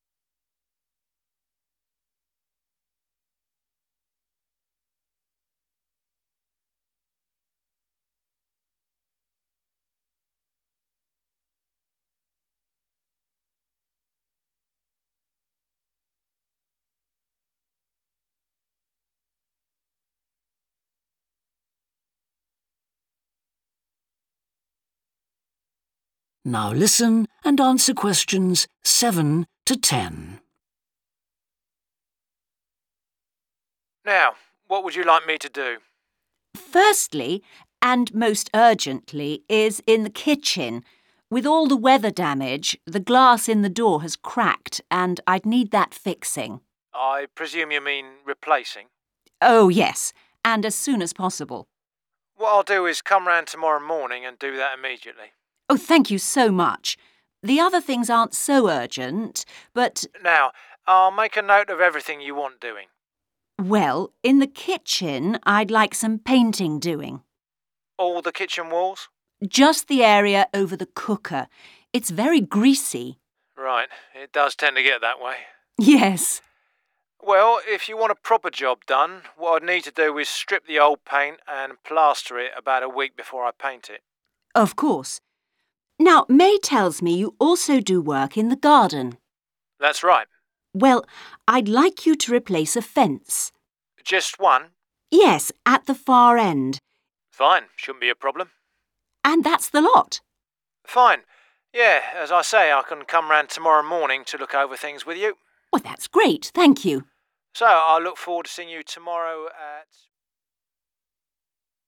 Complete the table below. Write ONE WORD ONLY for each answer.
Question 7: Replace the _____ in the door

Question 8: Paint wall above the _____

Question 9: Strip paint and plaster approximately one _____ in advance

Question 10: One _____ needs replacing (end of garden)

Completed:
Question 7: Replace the glass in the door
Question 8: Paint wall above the cooker
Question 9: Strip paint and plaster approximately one week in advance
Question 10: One fence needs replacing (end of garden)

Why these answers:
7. The correct answer is 'glass' because the excerpt specifically mentions the need to fix the glass in the kitchen door, which fits the context of a cracked glass needing replacement.
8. The correct answer is 'cooker' because Edith specifically mentions painting the wall above the cooker since it is greasy. This shows that the area needing paint is indeed located above the cooker.
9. The correct answer is 'week' because it directly corresponds to the timeframe of one week mentioned in the excerpt. By plastering the wall a week in advance, it allows enough time for the work to be properly completed before painting.
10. The correct answer matches the request made in the excerpt, which is to replace a fence in the garden, aligning perfectly with the information provided.